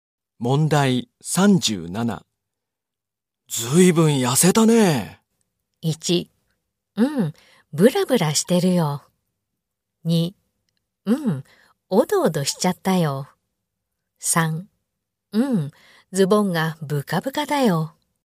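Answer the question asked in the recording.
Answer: 3: うん、ズボンがブカブカだよ。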